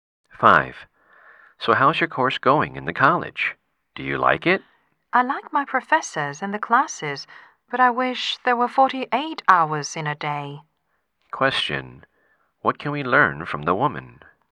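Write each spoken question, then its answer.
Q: What can we learn from the woman?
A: She is very busy and short of time.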